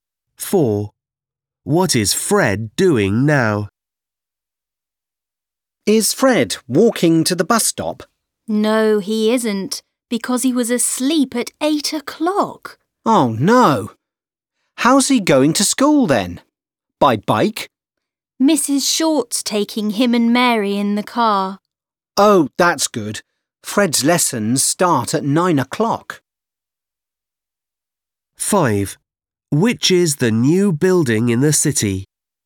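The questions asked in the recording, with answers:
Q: What is Fred doing now?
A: Going to school in Mrs. Short's car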